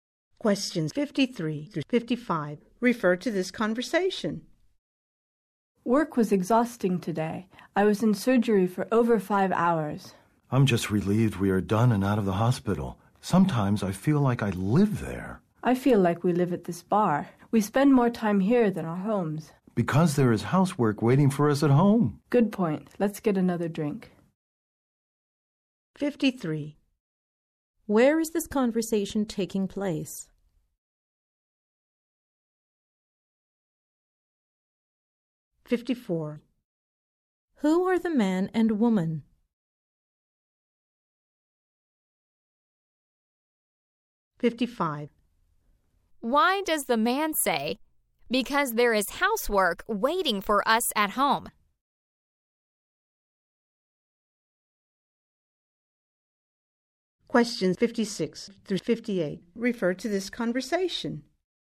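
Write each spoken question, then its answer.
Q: Where is this conversation taking place?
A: At a bar

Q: Who are the man and woman?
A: Hospital workers (surgeons/doctors)

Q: Why does the man say, "Because there is housework waiting for us at home"?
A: To explain why they spend more time at the bar than at home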